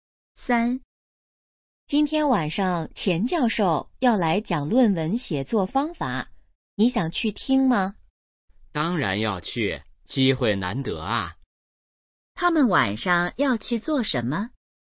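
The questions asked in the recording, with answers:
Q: 他们晚上要去做什么?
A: 听钱教授讲论文写作方法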